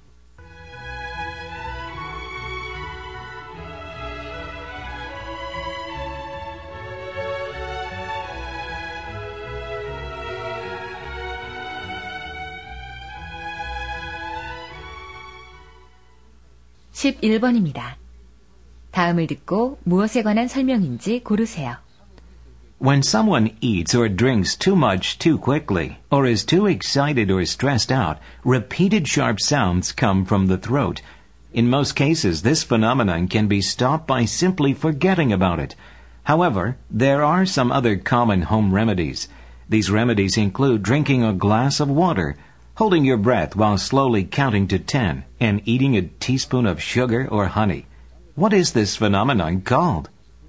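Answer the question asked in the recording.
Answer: Hiccups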